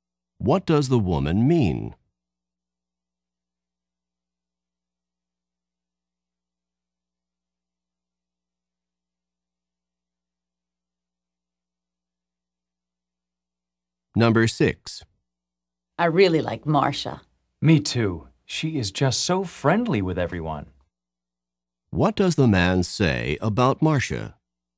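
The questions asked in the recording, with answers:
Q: What does the man say about Marcia?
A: She is friendly with everyone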